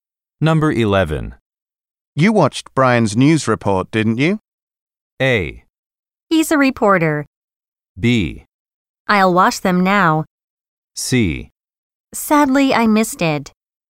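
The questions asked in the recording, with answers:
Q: You watched Brian's news report, didn't you?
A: C: Sadly, I missed it.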